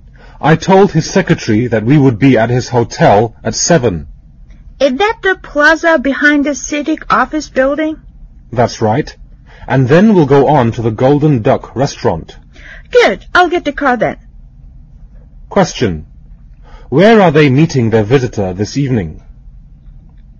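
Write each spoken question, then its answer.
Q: Where are they meeting their visitor this evening?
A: At his hotel (the Plaza)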